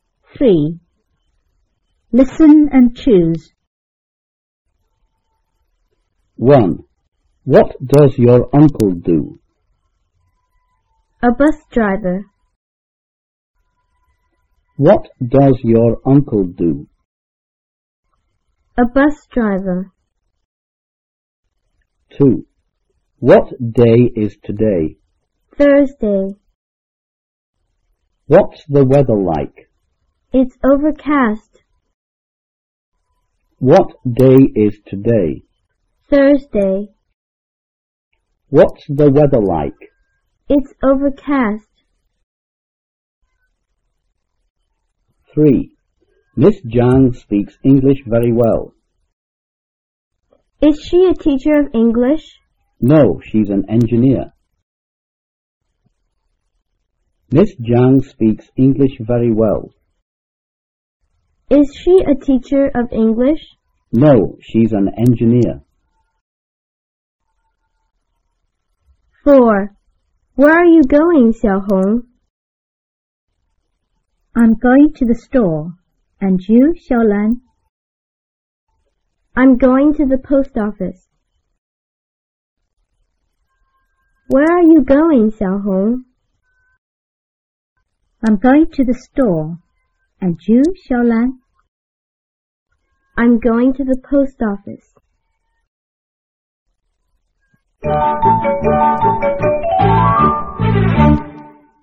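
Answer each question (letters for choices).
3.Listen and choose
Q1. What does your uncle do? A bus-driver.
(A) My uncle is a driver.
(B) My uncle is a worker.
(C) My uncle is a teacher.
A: A

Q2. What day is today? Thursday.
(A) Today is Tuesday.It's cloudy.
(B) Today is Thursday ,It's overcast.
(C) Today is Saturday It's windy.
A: B

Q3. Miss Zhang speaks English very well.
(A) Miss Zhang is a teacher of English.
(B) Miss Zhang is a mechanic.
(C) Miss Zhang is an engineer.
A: C

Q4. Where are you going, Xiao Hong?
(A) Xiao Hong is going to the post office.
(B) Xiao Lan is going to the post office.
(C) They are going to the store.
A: B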